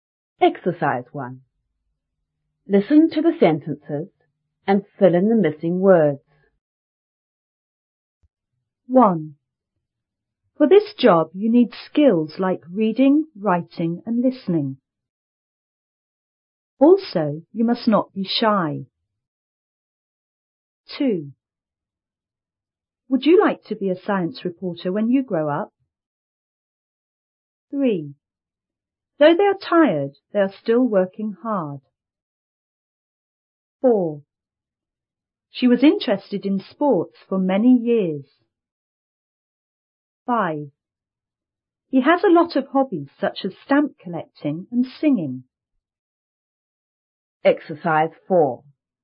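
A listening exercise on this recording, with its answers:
1.Listen to the sentences and fill in the missing words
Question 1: For this job,you need _ like reading,writing,and listening.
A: skills

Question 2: Also,you must not be __.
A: shy

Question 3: Would you like to be a _ reporter when you _ up.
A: science; grow

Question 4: _ they are tired,they are _ working hard.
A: Though; still

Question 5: She was _ in _ for many years.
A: interested; sports

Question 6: He has a lot of hobbies,_ _ stamp collecting and singing.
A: such as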